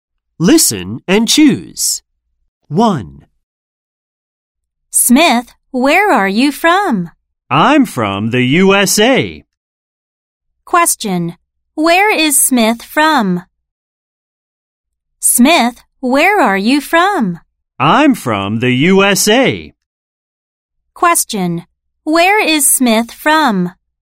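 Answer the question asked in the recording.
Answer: The USA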